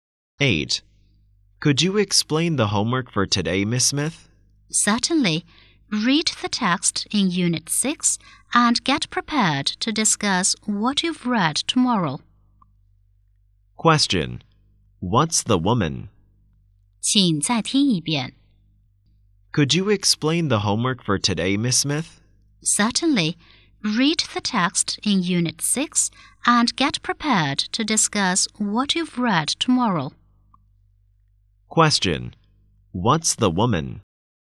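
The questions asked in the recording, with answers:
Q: What's the woman?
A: A teacher.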